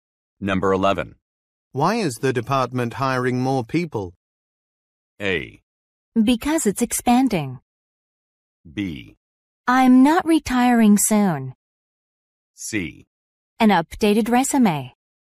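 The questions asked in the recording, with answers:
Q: Why is the department hiring more people?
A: A: Because it's expanding.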